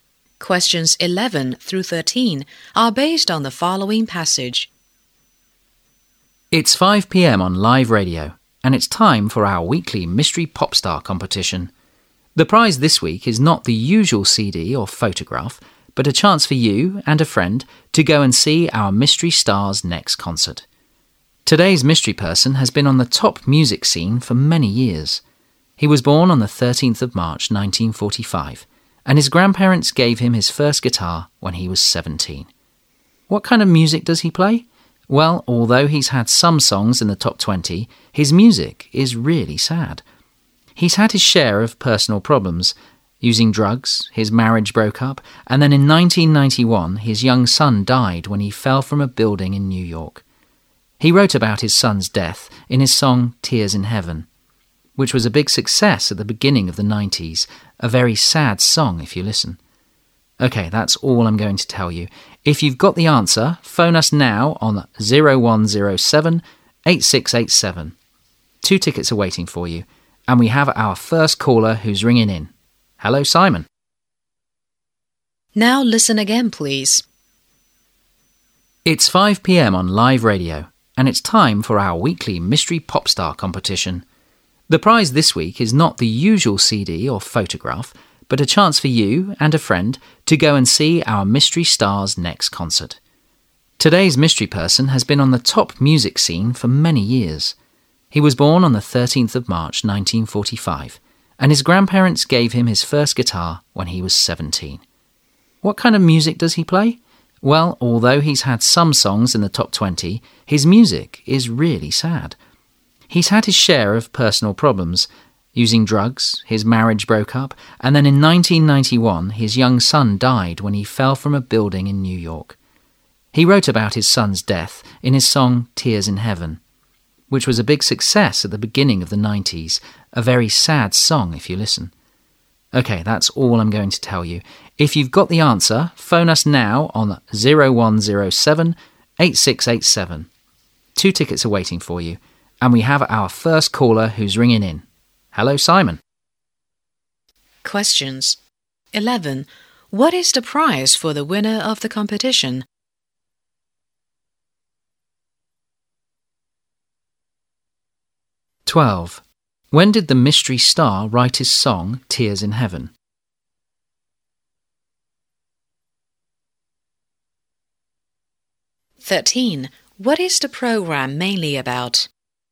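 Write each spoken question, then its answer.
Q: What is the prize for the winner of the competition?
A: Two tickets to the mystery star's next concert

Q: When did the mystery star write his song Tears in Heaven?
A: After his son died in 1991 (early 1990s)

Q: What is the program mainly about?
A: A mystery pop star competition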